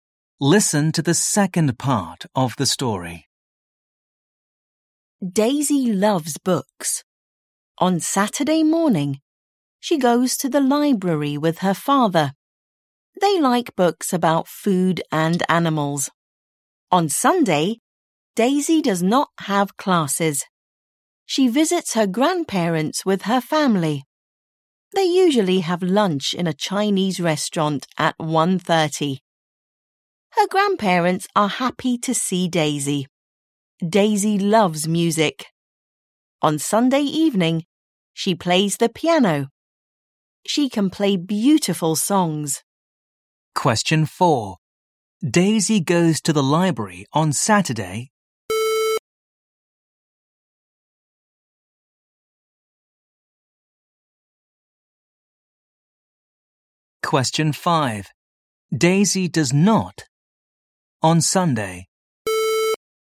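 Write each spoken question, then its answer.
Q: What does Daisy do on Sunday evening?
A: She plays the piano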